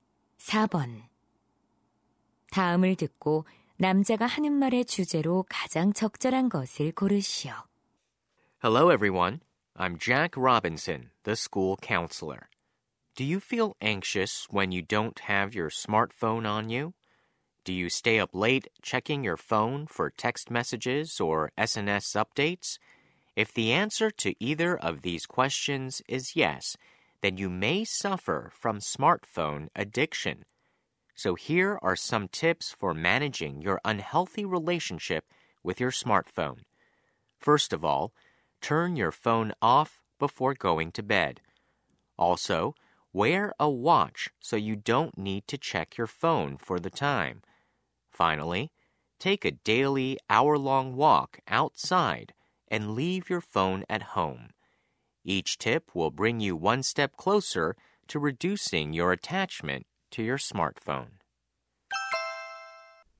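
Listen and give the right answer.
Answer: 스마트폰 중독을 줄이는 방법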